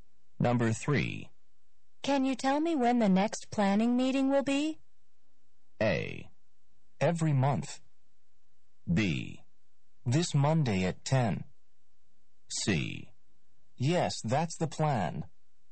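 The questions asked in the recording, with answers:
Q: Can you tell me when the next planning meeting will be?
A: B: This Monday at 10.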